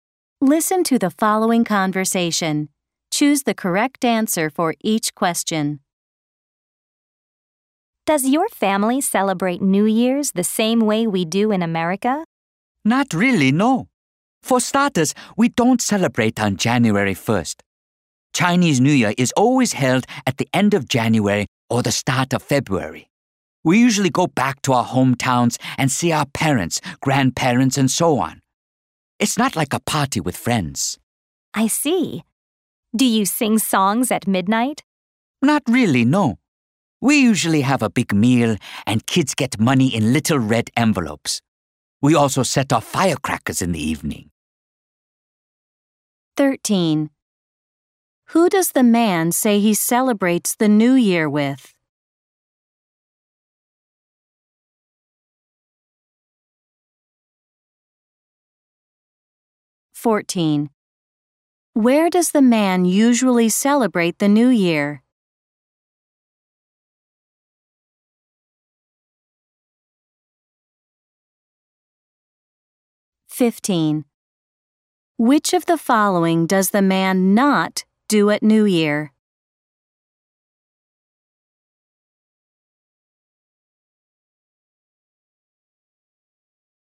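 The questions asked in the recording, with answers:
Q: Who does the man say he celebrates the New Year with?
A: His family (parents, grandparents, and so on)

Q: Where does the man usually celebrate the New Year?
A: In his hometown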